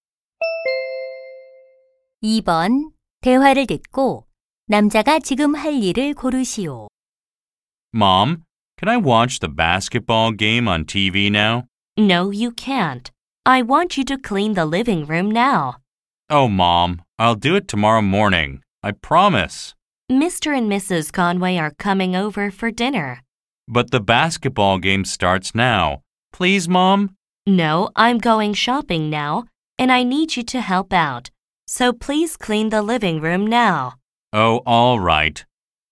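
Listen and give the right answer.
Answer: 거실 청소하기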